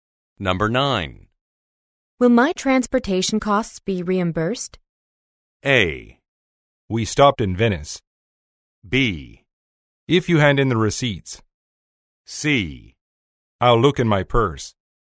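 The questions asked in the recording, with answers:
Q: Will my transportation costs be reimbursed?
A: B: If you hand in the receipts.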